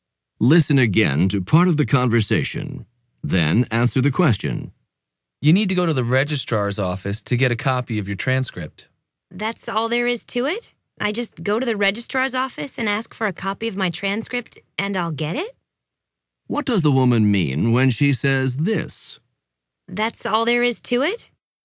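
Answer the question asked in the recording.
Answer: She is surprised that getting a transcript is so simple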